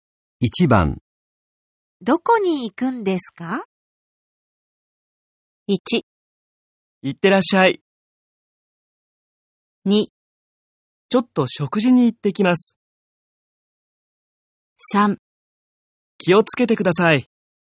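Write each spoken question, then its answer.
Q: どこに行くんですか?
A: 2: ちょっと食事に行ってきます。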